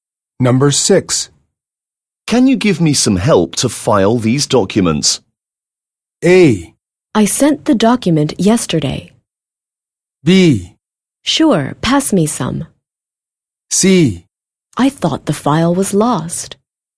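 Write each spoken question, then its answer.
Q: Can you give me some help to file these documents?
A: B: Sure, pass me some.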